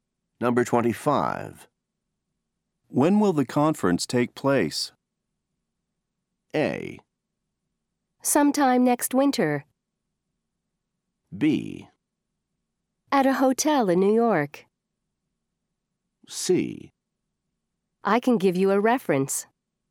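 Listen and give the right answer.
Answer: A: Sometime next winter.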